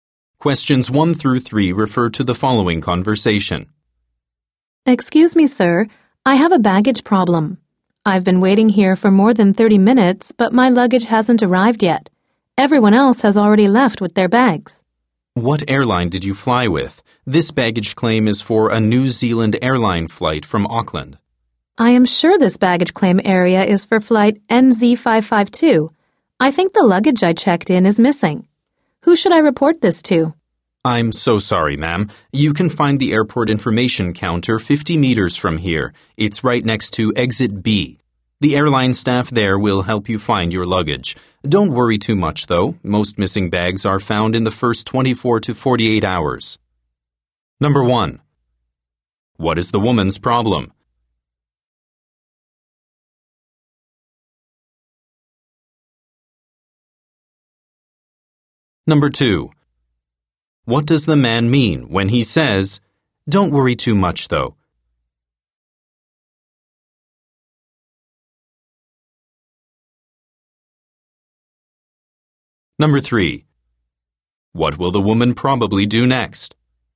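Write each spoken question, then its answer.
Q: What is the woman's problem?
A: Her luggage is missing

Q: What does the man mean when he says, "Don't worry too much, though"?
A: Her luggage will probably be found soon

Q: What will the woman probably do next?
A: Go to the airport information counter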